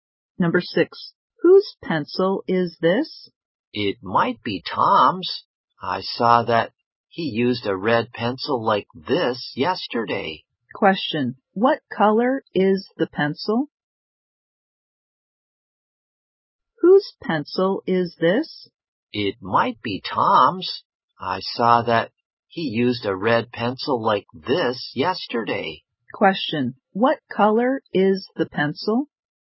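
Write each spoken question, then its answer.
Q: Question, what color is the pencil?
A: Red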